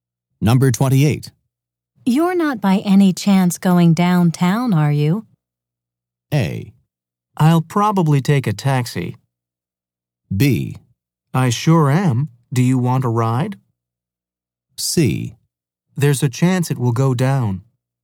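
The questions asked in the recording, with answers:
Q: You're not by any chance going downtown, are you?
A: B: I sure am. Do you want a ride?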